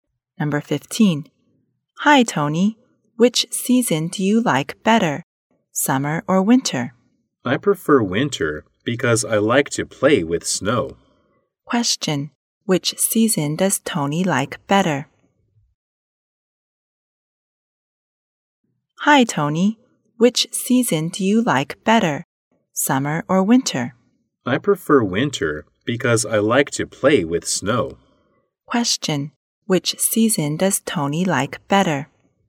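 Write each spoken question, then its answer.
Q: Which season does Tony like better?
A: Winter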